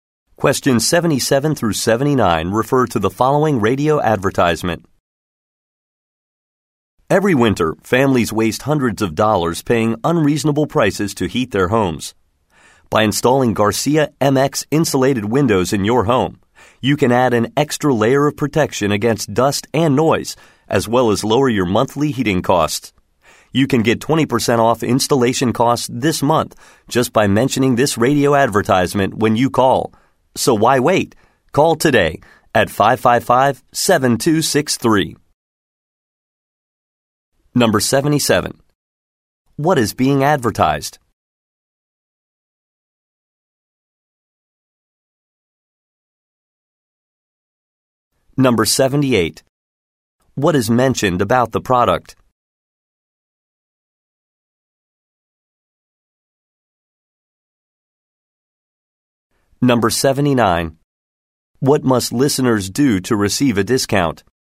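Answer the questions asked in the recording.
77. Insulated windows
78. It lowers heating costs and protects against dust and noise
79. Mention the radio advertisement when calling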